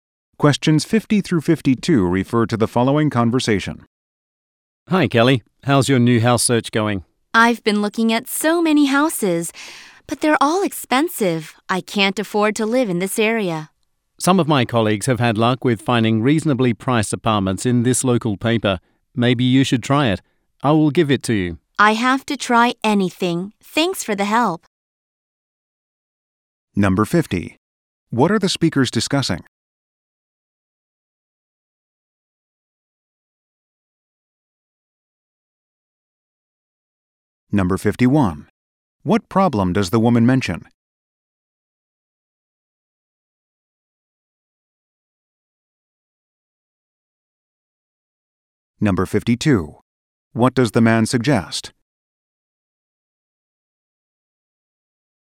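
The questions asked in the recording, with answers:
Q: What are the speakers discussing?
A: The woman's search for a new house

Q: What problem does the woman mention?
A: The houses are too expensive

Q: What does the man suggest?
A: Looking for apartments in the local paper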